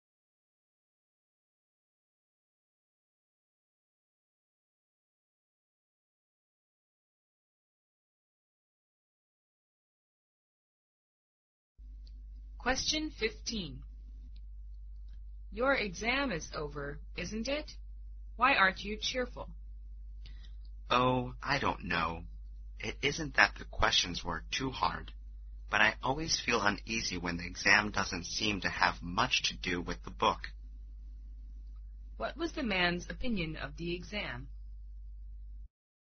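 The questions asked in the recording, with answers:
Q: What was the man's opinion of the exam?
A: It didn't have much to do with the book.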